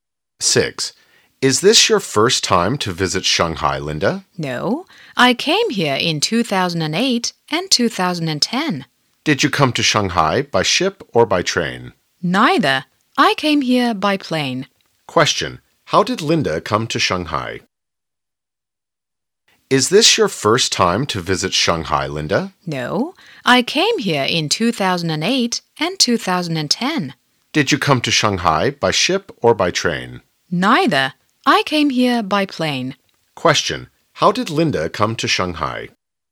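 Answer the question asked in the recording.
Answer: By plane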